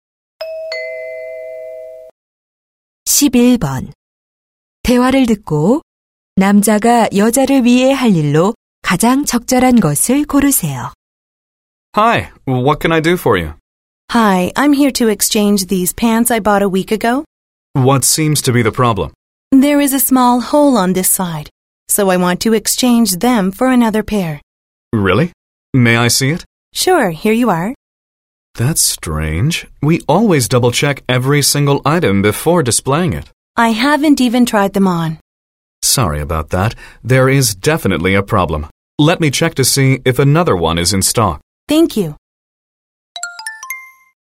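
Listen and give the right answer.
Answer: 다른 바지 재고 확인하기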